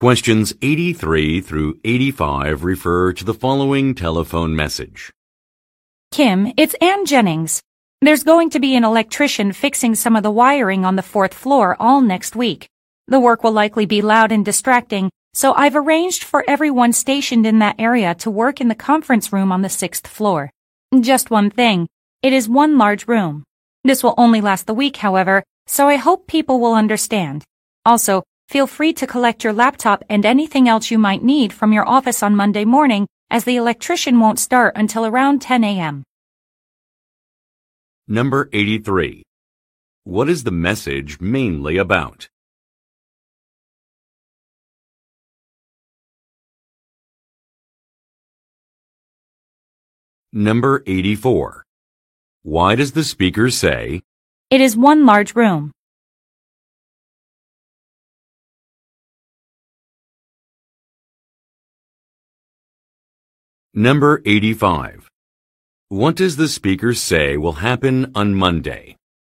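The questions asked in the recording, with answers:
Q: What is the message mainly about?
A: A temporary move to the sixth-floor conference room while an electrician fixes the fourth-floor wiring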